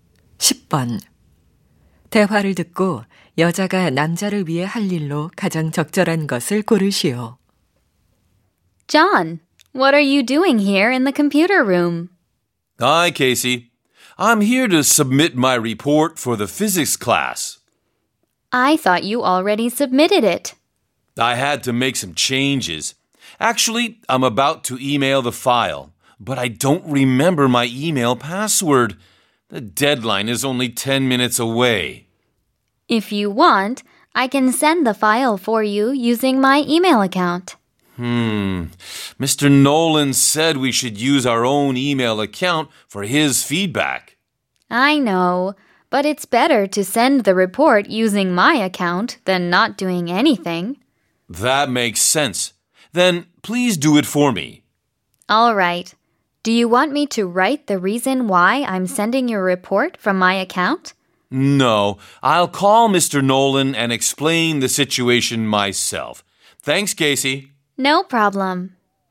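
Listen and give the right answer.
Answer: 자신의 이메일 계정으로 남자의 보고서 파일 보내기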